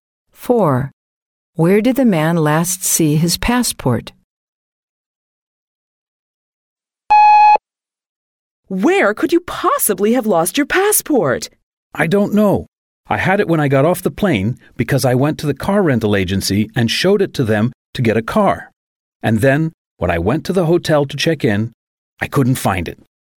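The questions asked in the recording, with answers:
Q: Where did the man last see his passport?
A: At the car rental agency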